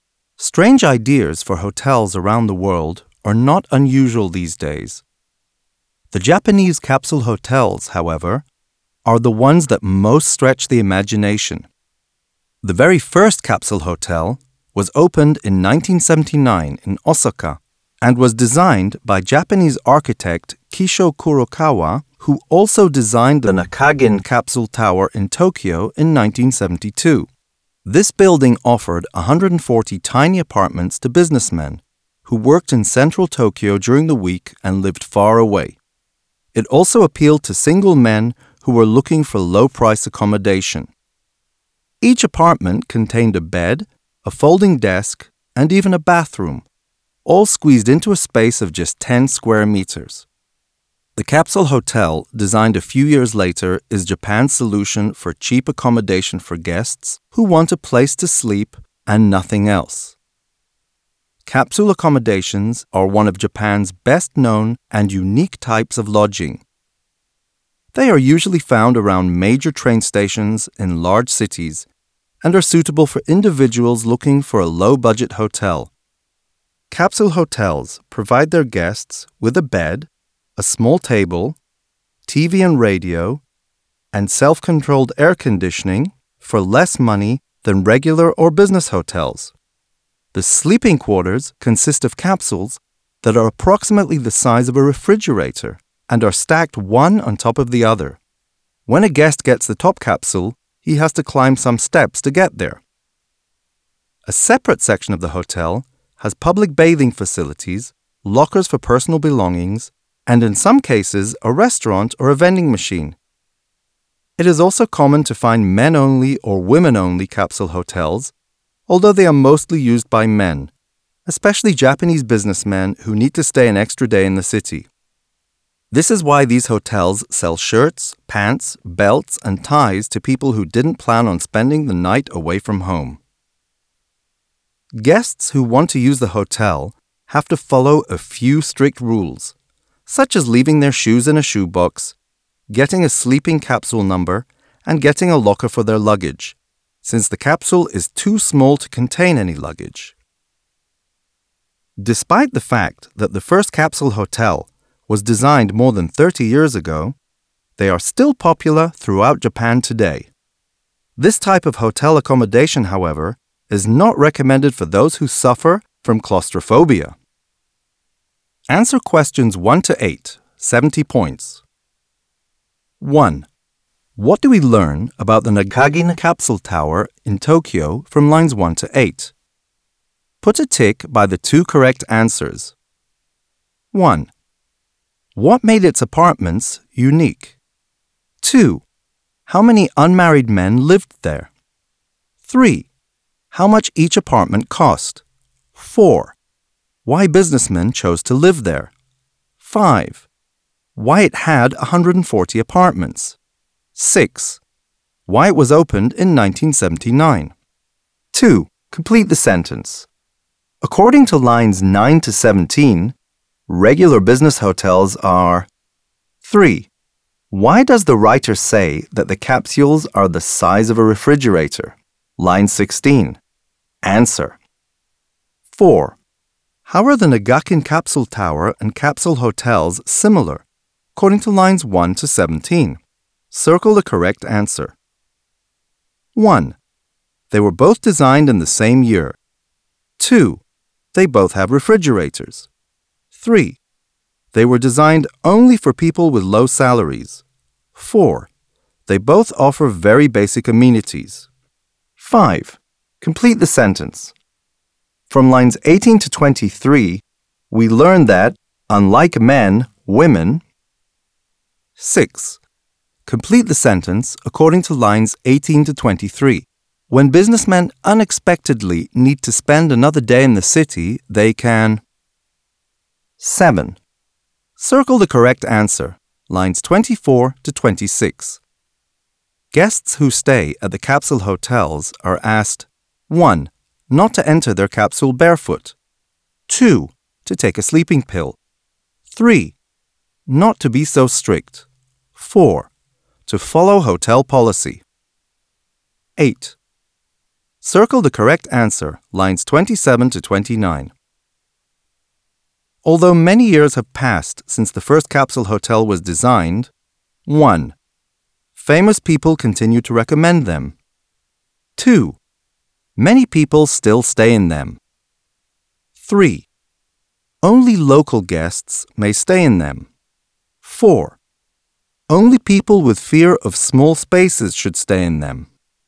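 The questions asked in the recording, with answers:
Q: What do we learn about the Nakagin capsule tower in Tokyo from lines 1 to 8?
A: 1: What made its apartments unique; 4: Why businessmen chose to live there

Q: Complete the sentence. According to lines 9 to 17, regular business hotels are...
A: more expensive than capsule hotels

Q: Why does the writer say that the capsules are the size of a refrigerator?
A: to show how small they are

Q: How are the Nakagin capsule tower and capsule hotels similar, according to lines 1 to 17?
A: 4: They both offer very basic amenities.

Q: Complete the sentence. From lines 18 to 23, we learn that, unlike men, women...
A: use capsule hotels less often

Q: When businessmen unexpectedly need to spend another day in the city, they can...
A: buy clothes (shirts, pants, belts, ties) at the hotel

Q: Guests who stay at the capsule hotels are asked, 1.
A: 4: To follow hotel policy.

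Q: Although many years have passed since the first capsule hotel was designed, 1.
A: 2: Many people still stay in them.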